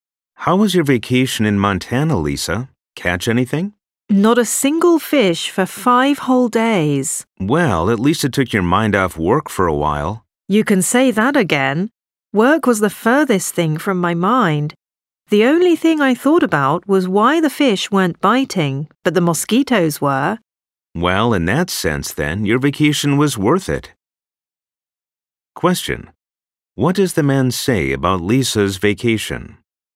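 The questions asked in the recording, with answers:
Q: What does the man say about Lisa's vacation?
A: It was worth it because it took her mind off work.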